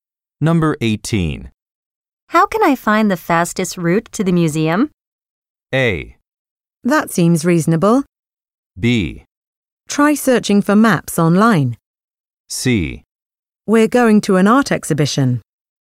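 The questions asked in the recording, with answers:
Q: How can I find the fastest route to the museum?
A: B: Try searching for maps online.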